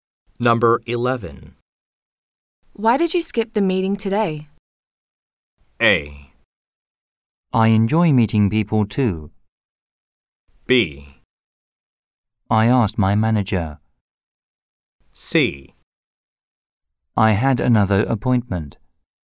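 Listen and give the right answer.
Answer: C: I had another appointment.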